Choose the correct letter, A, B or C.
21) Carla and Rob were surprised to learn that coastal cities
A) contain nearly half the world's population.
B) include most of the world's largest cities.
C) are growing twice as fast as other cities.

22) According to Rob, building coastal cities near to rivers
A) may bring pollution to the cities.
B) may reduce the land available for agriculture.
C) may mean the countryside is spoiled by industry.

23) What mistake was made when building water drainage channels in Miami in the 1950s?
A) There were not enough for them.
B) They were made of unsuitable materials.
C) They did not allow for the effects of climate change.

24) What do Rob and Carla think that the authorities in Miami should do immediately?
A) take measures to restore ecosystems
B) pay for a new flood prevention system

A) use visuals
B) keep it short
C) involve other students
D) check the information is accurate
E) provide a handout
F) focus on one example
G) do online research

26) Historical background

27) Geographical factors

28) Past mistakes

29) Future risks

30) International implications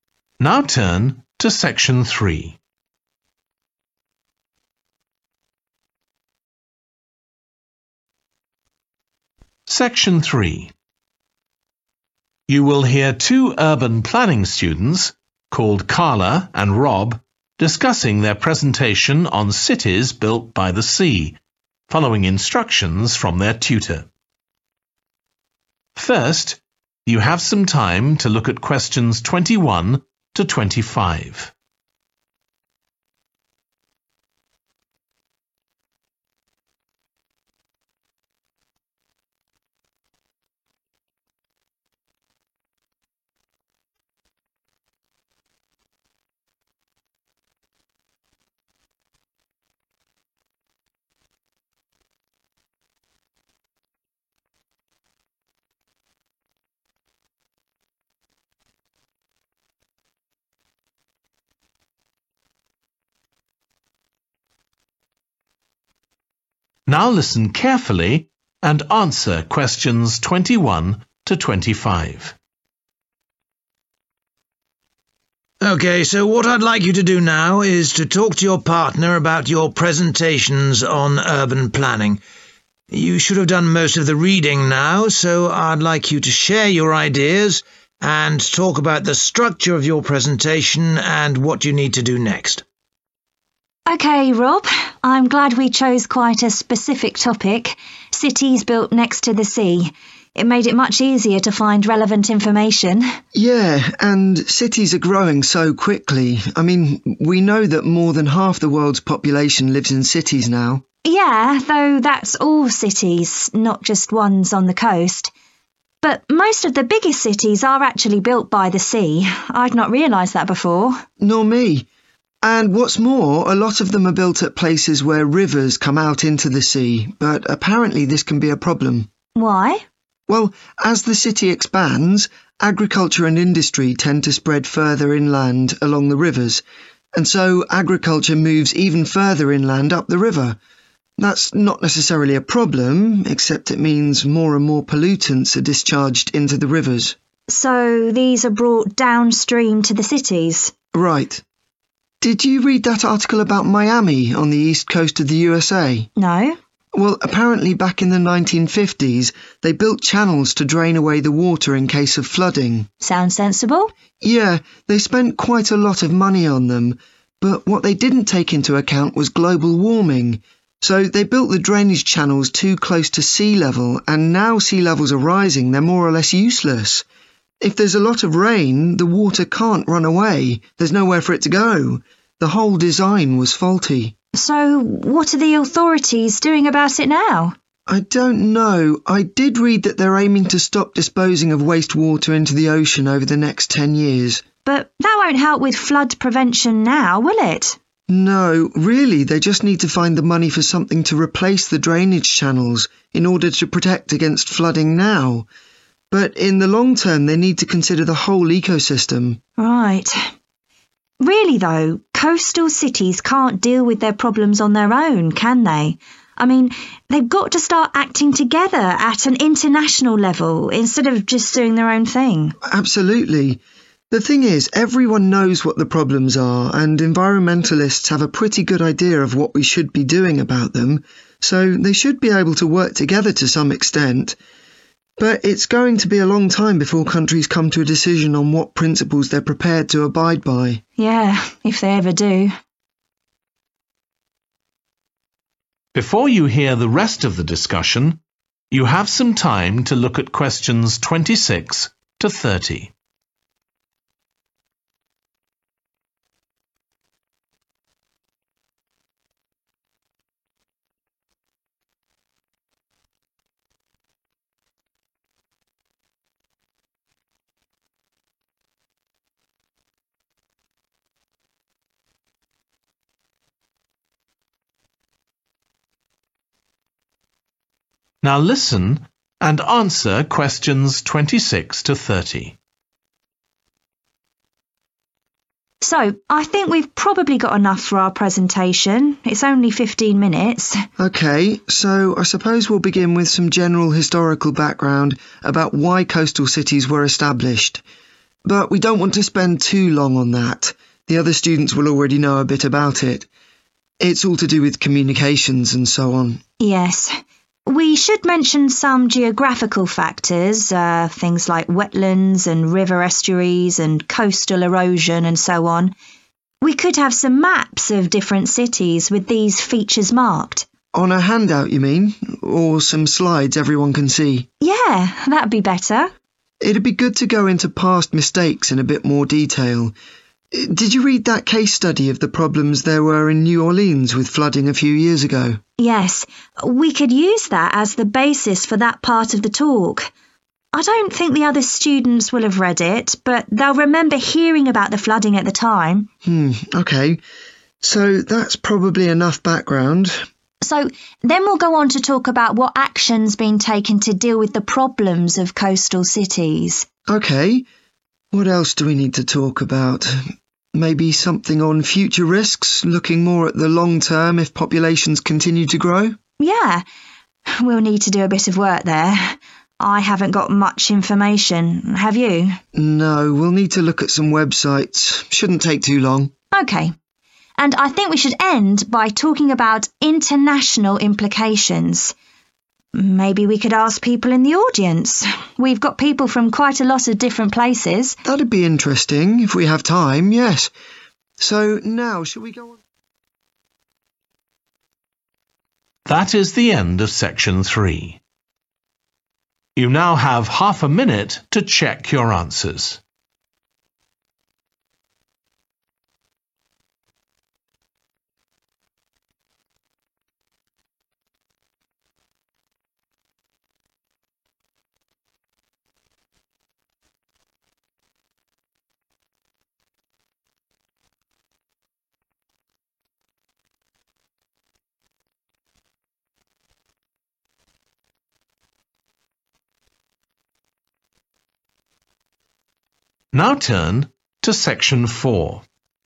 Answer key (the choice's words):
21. include most of the world's largest cities.
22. may bring pollution to the cities.
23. They did not allow for the effects of climate change.
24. pay for a new flood prevention system
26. keep it short
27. use visuals
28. focus on one example
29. do online research
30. involve other students